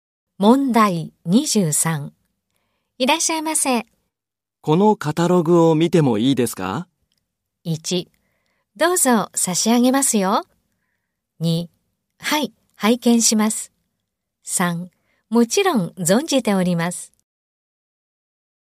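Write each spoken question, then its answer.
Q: このカタログを見てもいいですか?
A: 1: どうぞ差し上げますよ。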